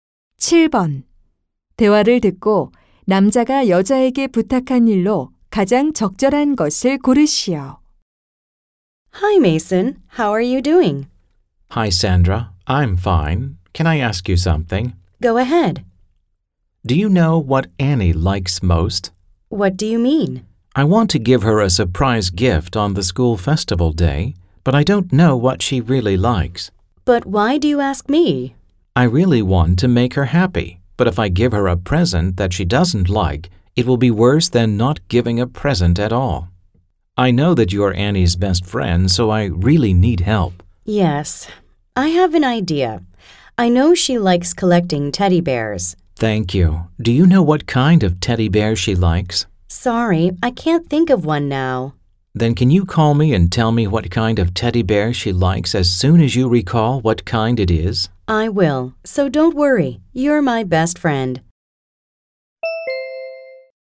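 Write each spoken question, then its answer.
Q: 대화를 듣고 남자가 여자에게 부탁한 일로 가장 적절한 것을 고르시오.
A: Annie가 좋아하는 곰 인형 종류가 생각나면 전화로 알려 주기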